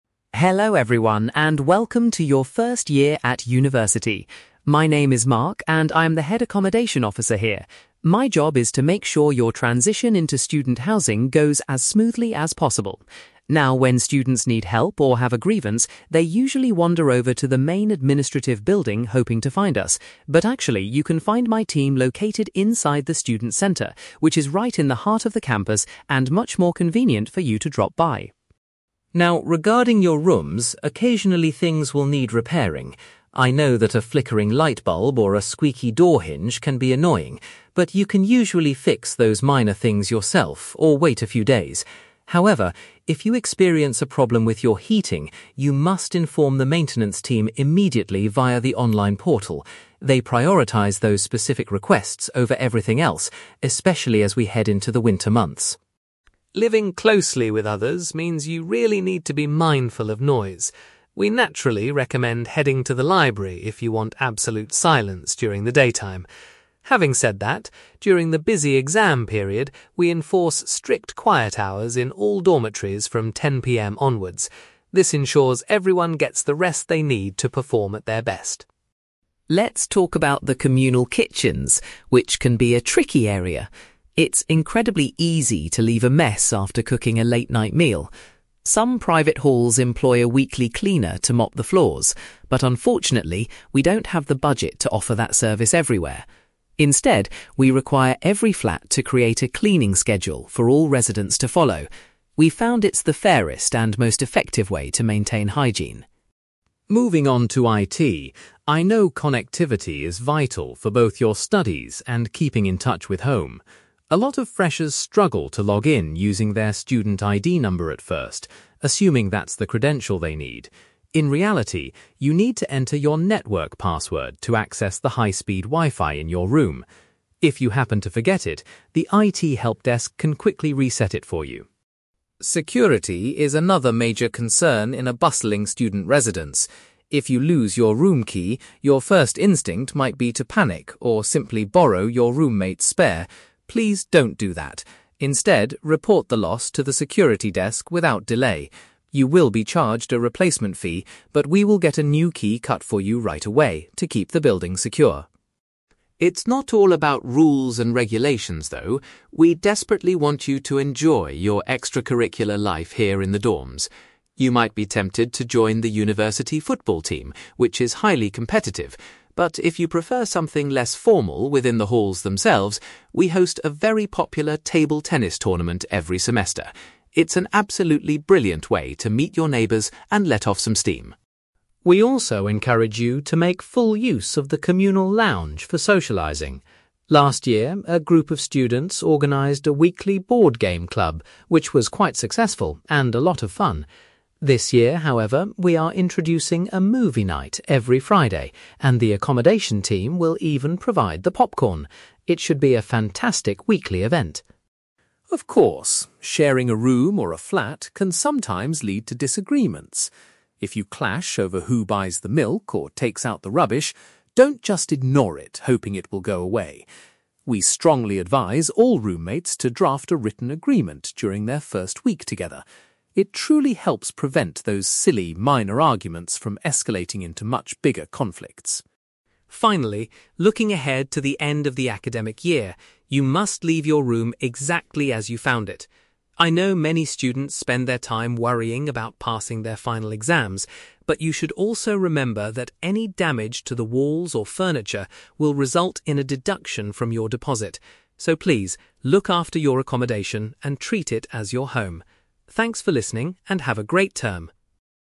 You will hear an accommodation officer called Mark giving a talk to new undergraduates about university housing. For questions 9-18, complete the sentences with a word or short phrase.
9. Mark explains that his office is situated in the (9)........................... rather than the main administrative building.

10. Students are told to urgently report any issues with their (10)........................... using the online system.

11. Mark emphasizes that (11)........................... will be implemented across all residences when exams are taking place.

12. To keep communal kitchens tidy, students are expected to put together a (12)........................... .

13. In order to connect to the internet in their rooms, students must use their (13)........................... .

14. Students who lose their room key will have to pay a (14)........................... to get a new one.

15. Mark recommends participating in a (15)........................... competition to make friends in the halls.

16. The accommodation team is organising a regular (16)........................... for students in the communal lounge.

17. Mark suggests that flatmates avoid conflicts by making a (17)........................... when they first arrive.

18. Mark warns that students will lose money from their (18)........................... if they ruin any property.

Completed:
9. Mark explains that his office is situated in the student centre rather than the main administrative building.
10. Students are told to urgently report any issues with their heating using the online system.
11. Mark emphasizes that quiet hours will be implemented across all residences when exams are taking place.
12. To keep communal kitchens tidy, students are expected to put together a cleaning schedule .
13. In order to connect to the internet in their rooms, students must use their network password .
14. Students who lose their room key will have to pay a replacement fee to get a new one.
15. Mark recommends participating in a table tennis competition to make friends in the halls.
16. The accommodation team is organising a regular movie night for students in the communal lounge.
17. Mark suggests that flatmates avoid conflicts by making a written agreement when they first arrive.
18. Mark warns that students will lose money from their deposit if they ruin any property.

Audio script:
Mark: Hello everyone, and welcome to your first year at university! My name is Mark, and I'm the head accommodation officer here. My job is to make sure your transition into student housing goes as smoothly as possible. Now, when students need help or have a grievance, they usually wander over to the main administrative building hoping to find us. But actually, you can find my team located inside the student centre, which is right in the heart of the campus and much more convenient for you to drop by.
Now, regarding your rooms, occasionally things will need repairing. I know that a flickering light bulb or a squeaky door hinge can be annoying, but you can usually fix those minor things yourself or wait a few days. However, if you experience a problem with your heating, you must inform the maintenance team immediately via the online portal. They prioritise those specific requests over everything else, especially as we head into the winter months.
Living closely with others means you really need to be mindful of noise. We naturally recommend heading to the library if you want absolute silence during the daytime. Having said that, during the busy exam period, we enforce strict quiet hours in all dormitories from 10 PM onwards. This ensures everyone gets the rest they need to perform at their best.
Let's talk about the communal kitchens, which can be a tricky area. It's incredibly easy to leave a mess after cooking a late-night meal. Some private halls employ a weekly cleaner to mop the floors, but unfortunately, we don't have the budget to offer that service everywhere. Instead, we require every flat to create a cleaning schedule for all residents to follow. We've found it's the fairest and most effective way to maintain hygiene.
Moving on to IT, I know connectivity is vital for both your studies and keeping in touch with home. A lot of freshers struggle to log in using their student ID number at first, assuming that's the credential they need. In reality, you need to enter your network password to access the high-speed Wi-Fi in your room. If you happen to forget it, the IT helpdesk can quickly reset it for you.
Security is another major concern in a bustling student residence. If you lose your room key, your first instinct might be to panic or simply borrow your roommate's spare. Please don't do that; instead, report the loss to the security desk without delay. You will be charged a replacement fee, but we will get a new key cut for you right away to keep the building secure.
It's not all about rules and regulations, though; we desperately want you to enjoy your extracurricular life here in the dorms. You might be tempted to join the university football team, which is highly competitive, but if you prefer something less formal within the halls themselves, we host a very popular table tennis tournament every semester. It's an absolutely brilliant way to meet your neighbours and let off some steam.
We also encourage you to make full use of the communal lounge for socialising. Last year, a group of students organised a weekly board game club which was quite successful and a lot of fun. This year, however, we are introducing a movie night every Friday, and the accommodation team will even provide the popcorn! It should be a fantastic weekly event.
Of course, sharing a room or a flat can sometimes lead to disagreements. If you clash over who buys the milk or takes out the rubbish, don't just ignore it hoping it will go away. We strongly advise all roommates to draft a written agreement during their first week together. It truly helps prevent those silly, minor arguments from escalating into much bigger conflicts.
Finally, looking ahead to the end of the academic year, you must leave your room exactly as you found it. I know many students spend their time worrying about passing their final exams, but you should also remember that any damage to the walls or furniture will result in a deduction from your deposit. So please, look after your accommodation and treat it as your home. Thanks for listening, and have a great term!

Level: B2